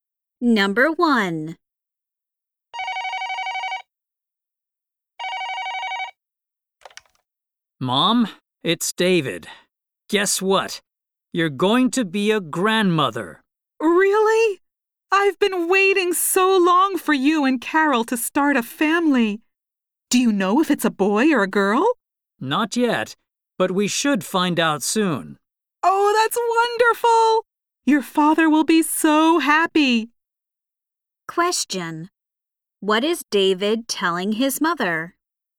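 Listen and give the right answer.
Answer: He and Carol are going to have a baby.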